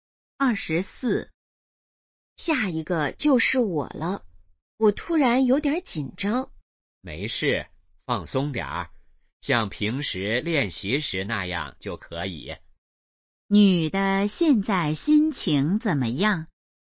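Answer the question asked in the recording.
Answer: 紧张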